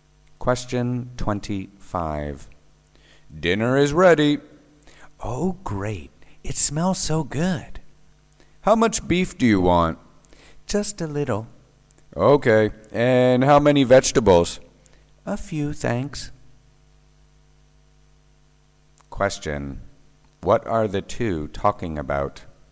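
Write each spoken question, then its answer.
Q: What are the two talking about?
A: Food for dinner (how much beef and vegetables to serve)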